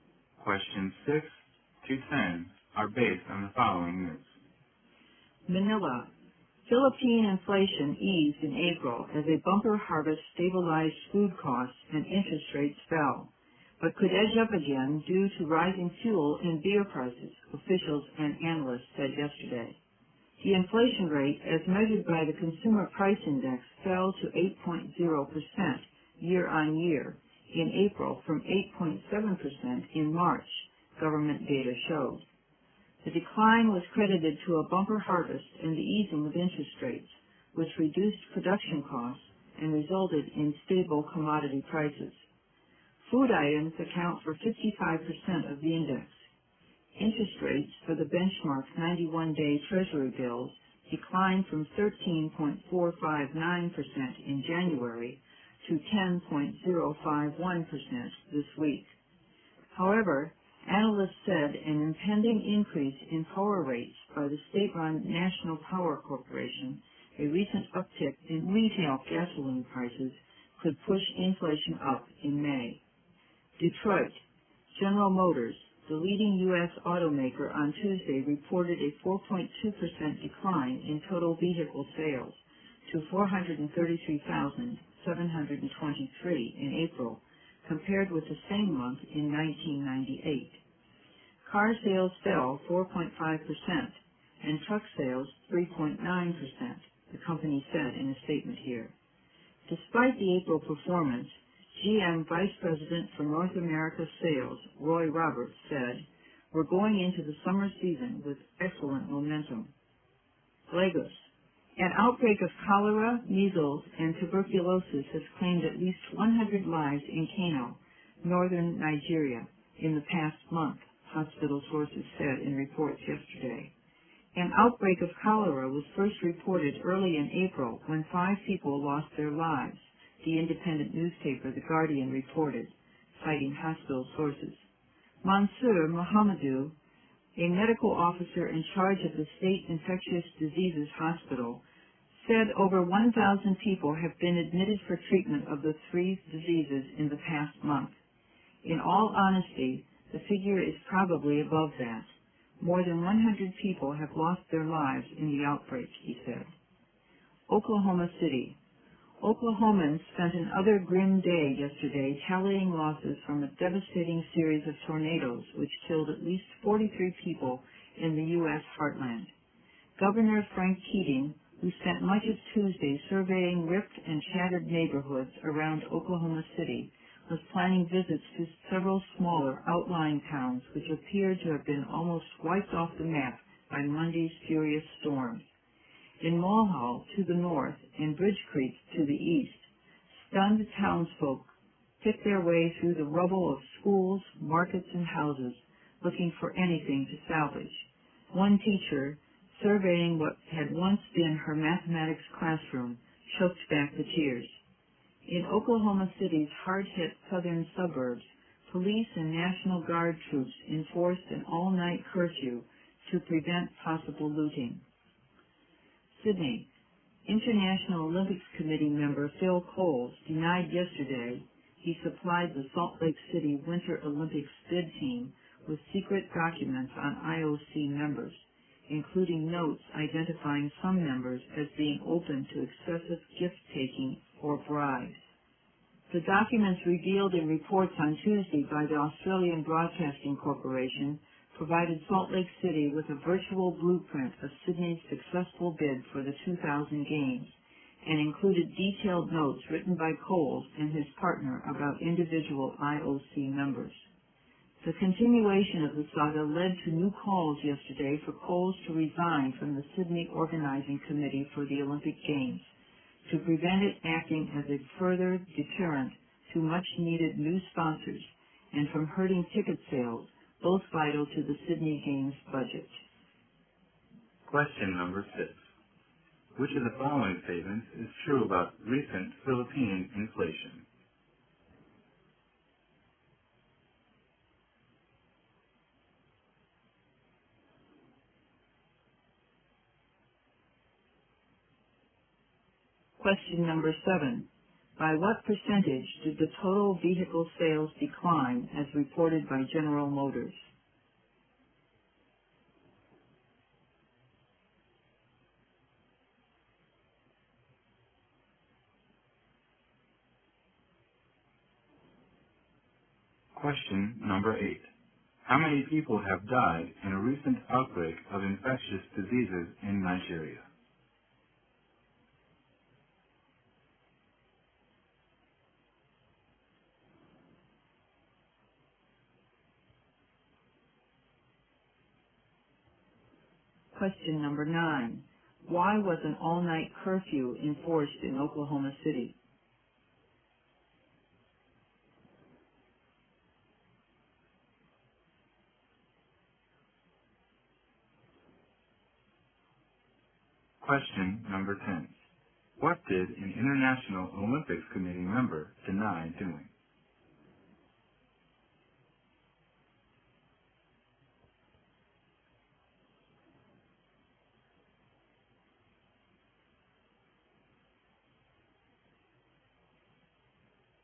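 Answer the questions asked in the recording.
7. 4.2%
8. At least 100
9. To prevent possible looting
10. Supplying the Salt Lake City bid team with secret documents on IOC members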